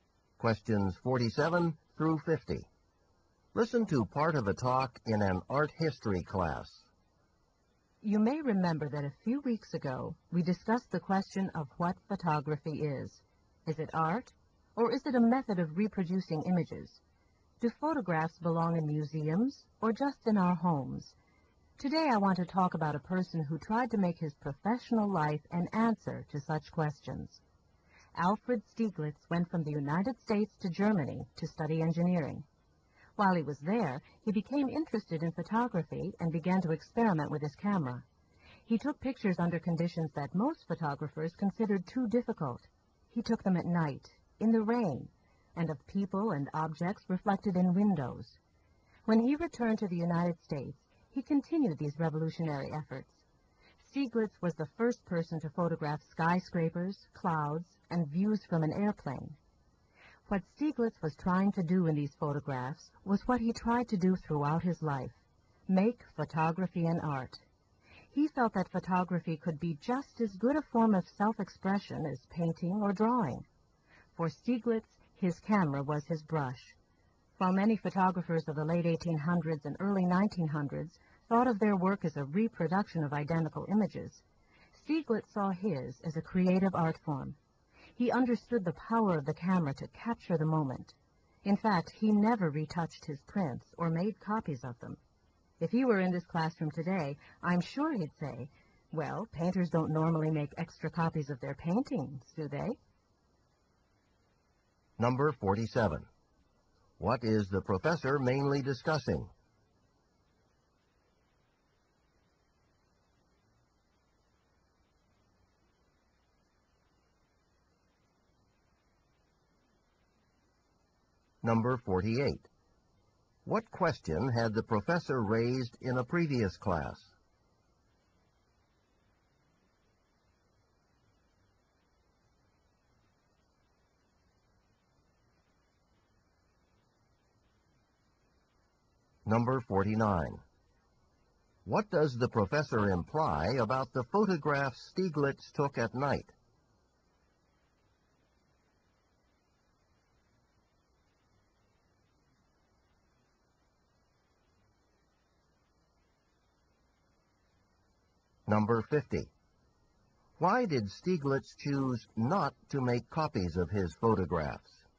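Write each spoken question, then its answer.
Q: What is the professor mainly discussing?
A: Alfred Stieglitz's efforts to make photography an art

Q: What question had the professor raised in a previous class?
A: Whether photography is art

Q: Why did Stieglitz choose not to make copies of his photographs?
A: He considered each photograph a unique work of art, like a painting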